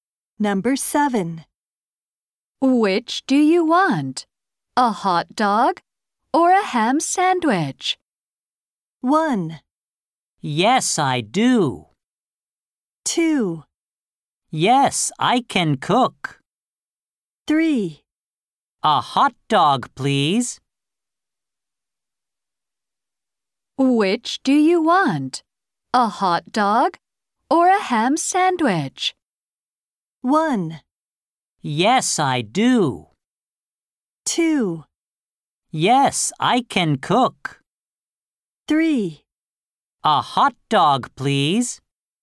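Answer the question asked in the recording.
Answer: 3: A hot dog, please.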